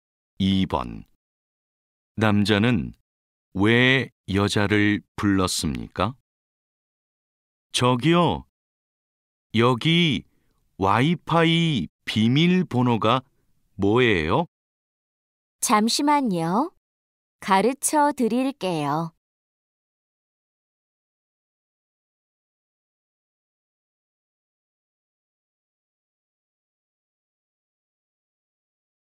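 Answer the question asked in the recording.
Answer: 와이파이 비밀번호를 물어보려고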